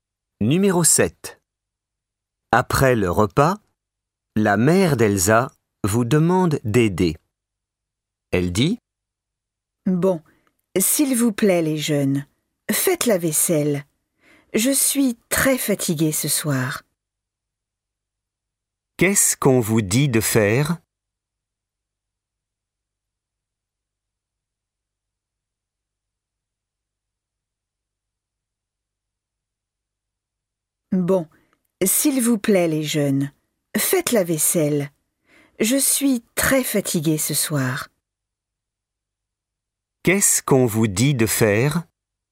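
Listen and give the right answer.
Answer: La vaisselle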